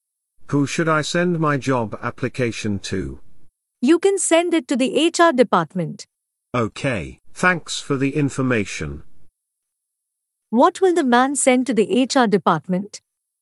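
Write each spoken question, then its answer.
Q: What will the man send to the HR department?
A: his job application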